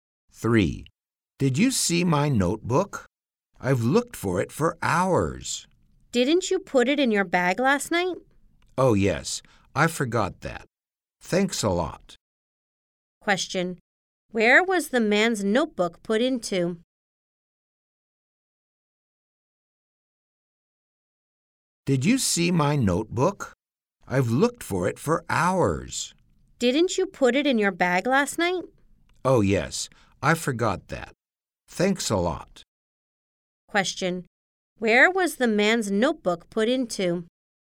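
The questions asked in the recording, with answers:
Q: Where was the man's notebook put into?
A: In his bag.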